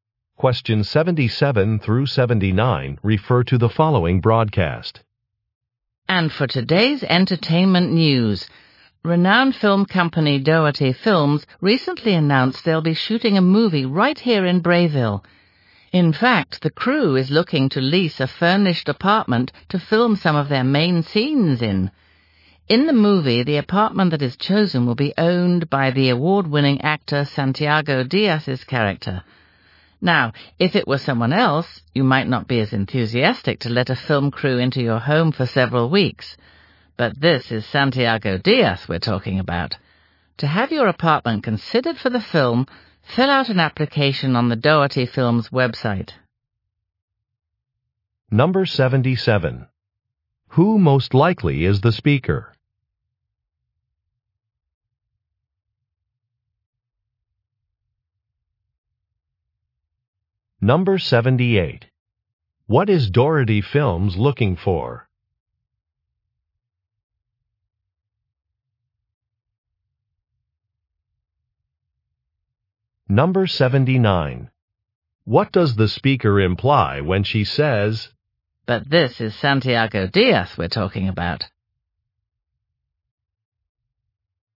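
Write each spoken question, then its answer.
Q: Who most likely is the speaker?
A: A radio news (entertainment) reporter

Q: What is Doherty Films looking for?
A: A furnished apartment to lease

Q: What does the speaker imply when she says,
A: People should be excited to let the crew use their home because Santiago Diaz is famous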